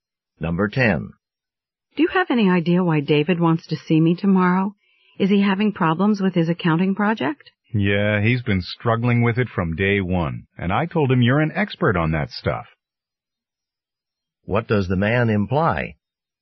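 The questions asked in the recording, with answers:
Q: What does the man imply?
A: David wants the woman's help with his accounting project.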